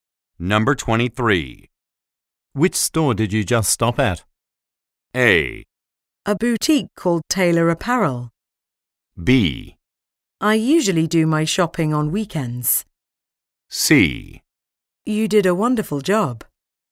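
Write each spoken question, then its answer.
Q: Which store did you just stop at?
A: A: A boutique called Taylor Apparel.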